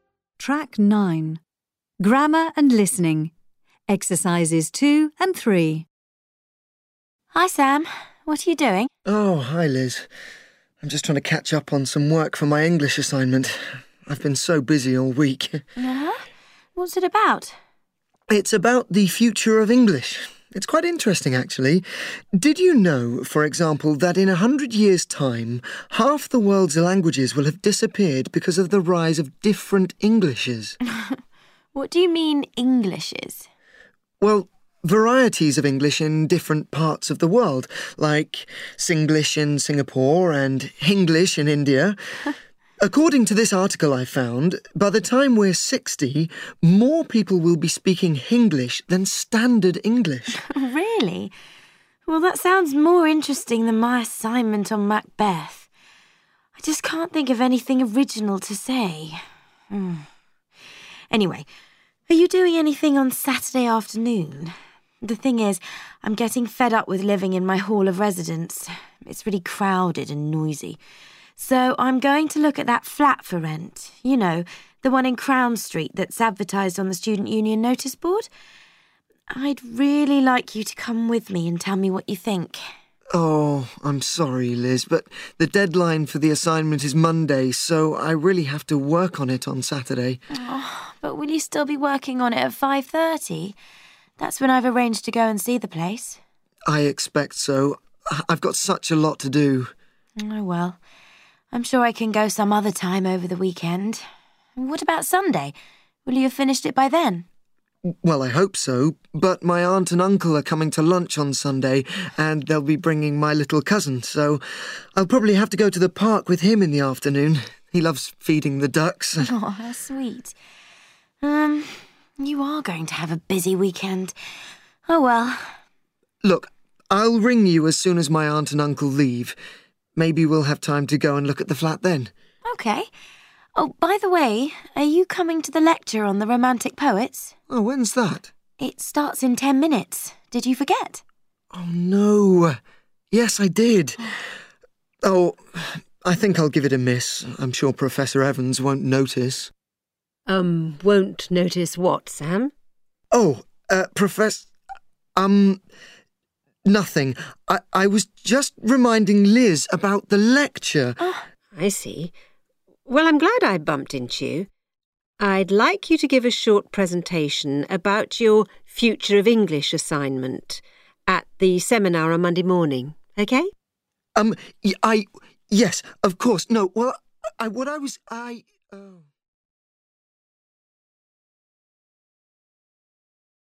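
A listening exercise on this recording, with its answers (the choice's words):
Choose the correct verb forms. Then listen again and check.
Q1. I 1 at that flat for rent.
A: am going to look

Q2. My uncle and aunt 2 to lunch on Sunday.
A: are coming

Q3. You 3 a busy weekend.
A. .are having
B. .are gong to have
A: .are gong to have

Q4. I 4 you as soon as my aunt and uncle leave.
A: 'll ring

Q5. Maybe we 5 time to go and look at the flat then.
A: 'll have

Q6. The lecture will6 in ten minutes.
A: start

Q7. I think I 7 it a miss.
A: 'll give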